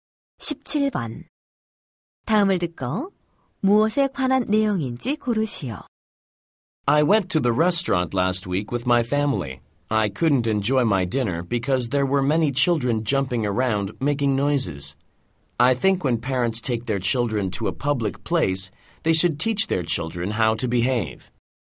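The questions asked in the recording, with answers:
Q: 다음을 듣고 무엇에 관한 내용인지 고르시오.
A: 공공장소에서 아이들의 예절 교육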